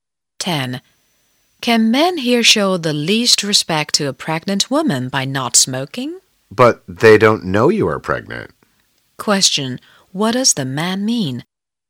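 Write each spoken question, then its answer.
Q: What does the man mean?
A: The men aren't to blame because they don't know she is pregnant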